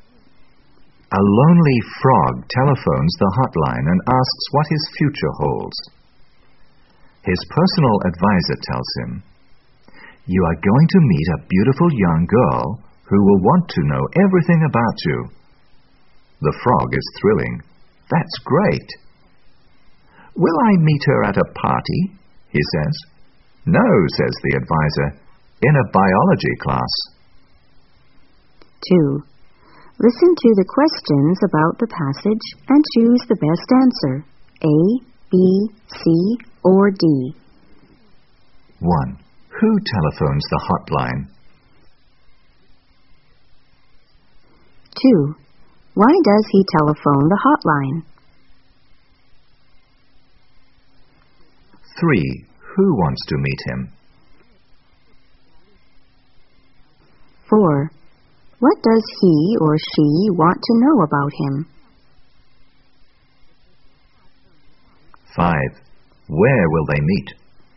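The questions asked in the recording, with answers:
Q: Who telephones the hotline?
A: A lonely frog

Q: Why does he telephone the hotline?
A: To ask what his future holds

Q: Who wants to meet him?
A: A beautiful young girl

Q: What does he or she want to know about him?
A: Everything about him

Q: Where will they meet?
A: In a biology class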